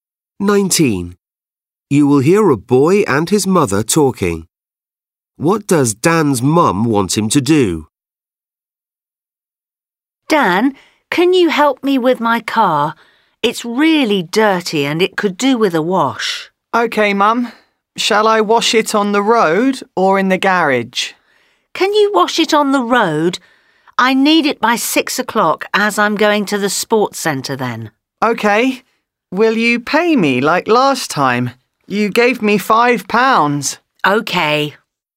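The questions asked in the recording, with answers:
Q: What does Dan's mum want him to do?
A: wash her car on the road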